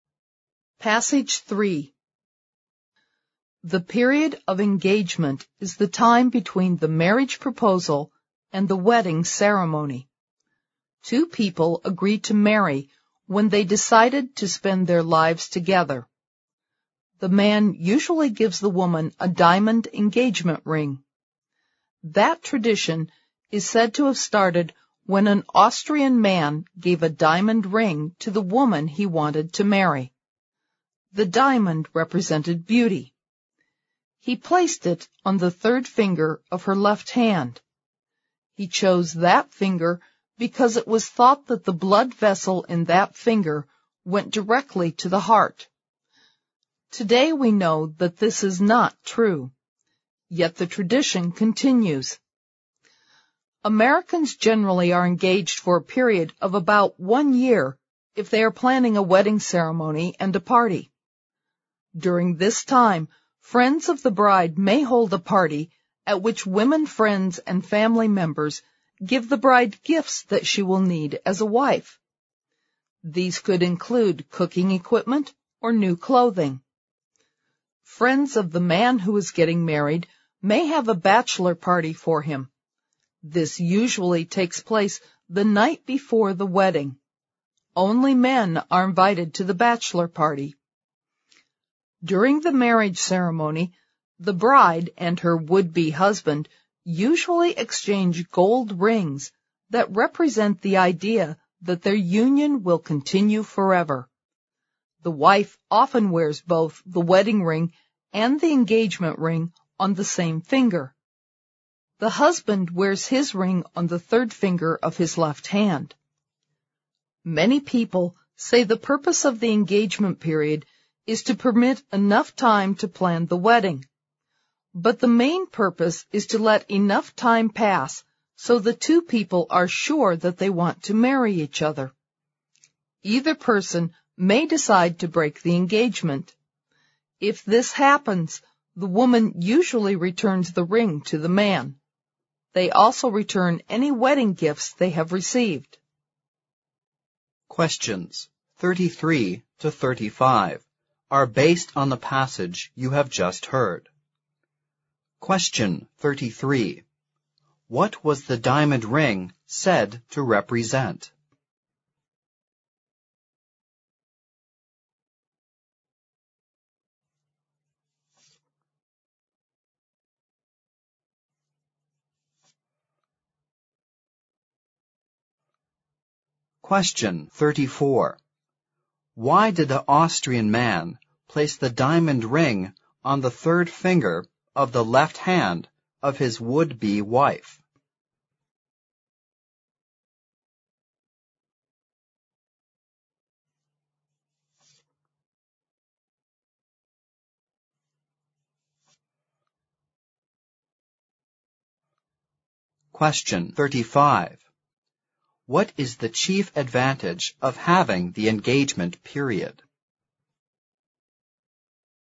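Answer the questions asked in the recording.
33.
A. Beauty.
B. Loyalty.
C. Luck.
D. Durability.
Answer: A. Beauty.
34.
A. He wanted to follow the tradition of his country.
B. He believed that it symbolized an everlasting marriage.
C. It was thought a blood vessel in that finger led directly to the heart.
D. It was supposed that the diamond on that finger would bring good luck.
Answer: C. It was thought a blood vessel in that finger led directly to the heart.
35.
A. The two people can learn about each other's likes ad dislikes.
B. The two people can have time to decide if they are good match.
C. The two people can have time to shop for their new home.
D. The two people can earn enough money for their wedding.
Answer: B. The two people can have time to decide if they are good match.

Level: 四级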